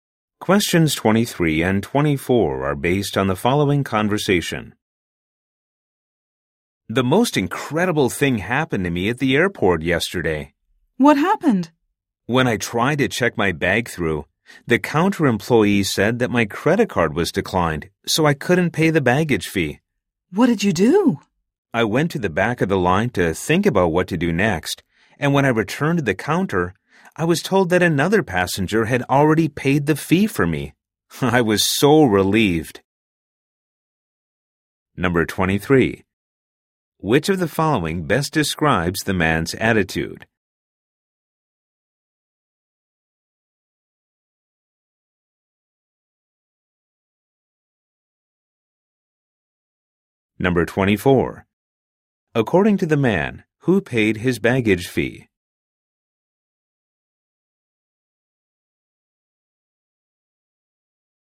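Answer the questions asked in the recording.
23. Relieved and amazed
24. Another passenger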